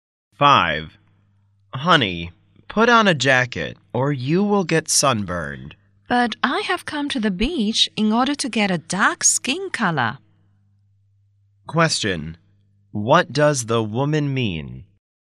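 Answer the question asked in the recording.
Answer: She wants to get a tan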